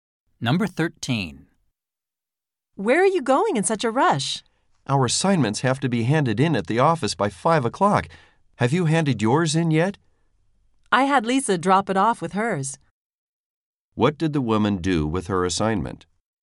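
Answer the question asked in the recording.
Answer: She had Lisa hand it in with hers.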